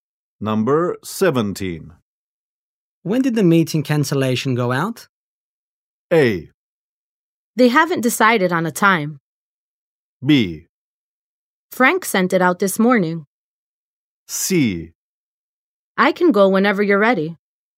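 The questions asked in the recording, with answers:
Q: When did the meeting cancellation go out?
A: B: Frank sent it out this morning.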